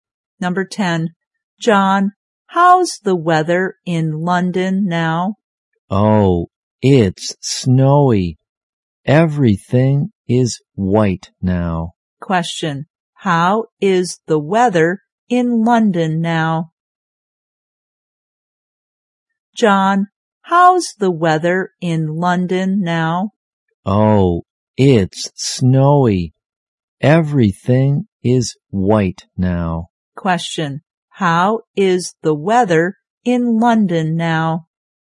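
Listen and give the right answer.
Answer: Snowy.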